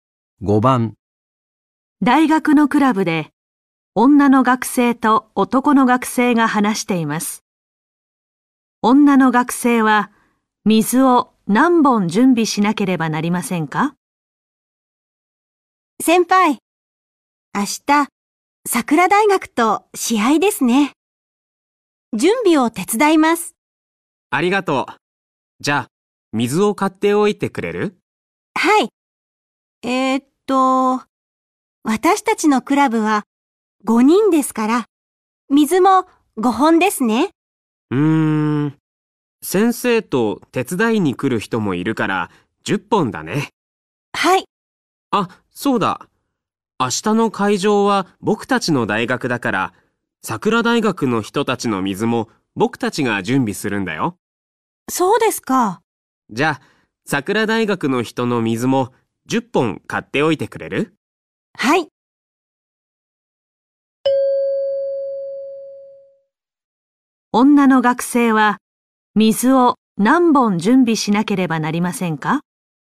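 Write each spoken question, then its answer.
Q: 女の学生は水を何本準備しなければなりませんか?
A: 20本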